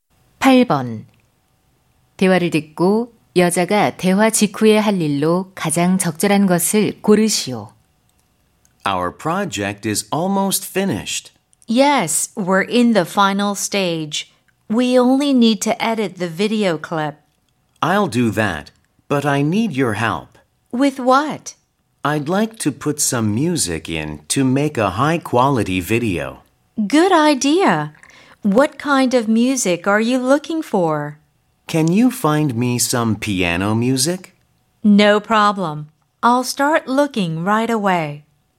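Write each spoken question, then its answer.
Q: 대화를 듣고 여자가 대화 직후에 할 일로 가장 적절한 것을 고르시오.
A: 피아노 음악 찾기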